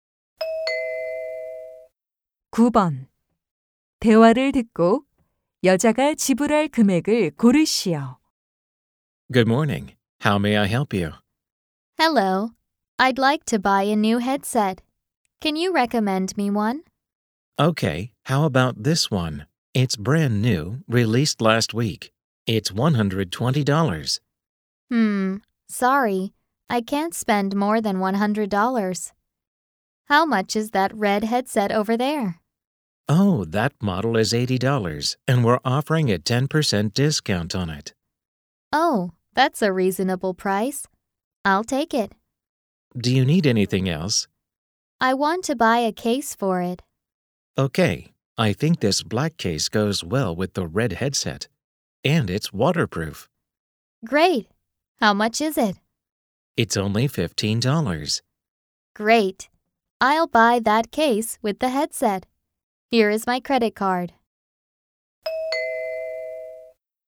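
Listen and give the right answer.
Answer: 87달러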